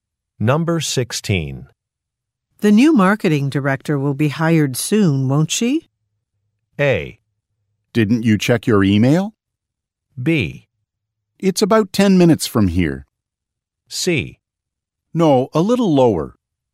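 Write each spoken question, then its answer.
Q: The new marketing director will be hired soon, won't she?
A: A: Didn't you check your email?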